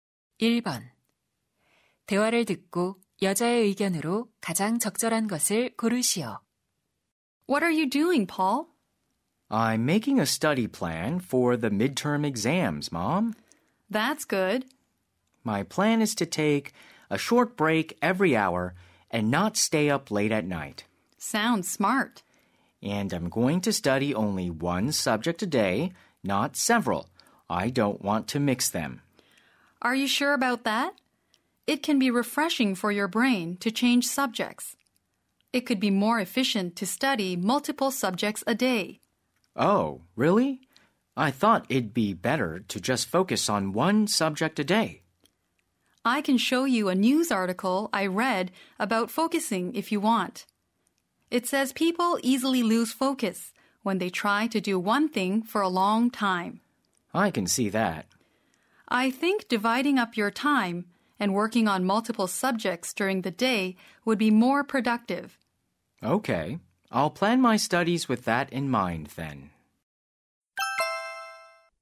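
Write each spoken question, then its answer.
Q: 대화를 듣고 여자의 의견으로 가장 적절한 것을 고르시오.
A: 하루에 여러 과목을 나누어 공부하는 것이 더 효율적이다.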